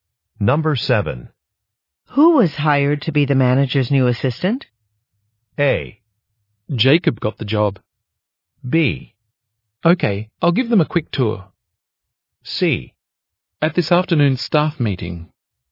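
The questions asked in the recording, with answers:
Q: Who was hired to be the manager's new assistant?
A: A: Jacob got the job.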